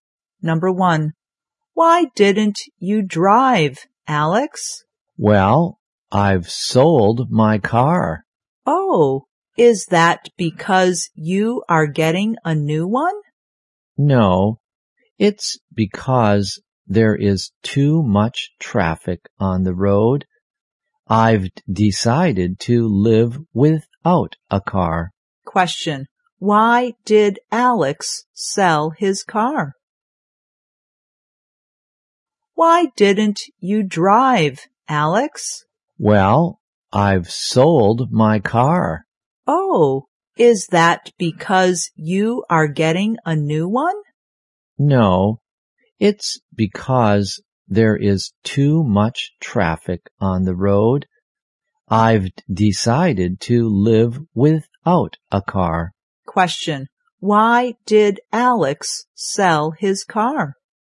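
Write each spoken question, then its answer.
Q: Why did Alex sell his car?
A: Because there is too much traffic on the road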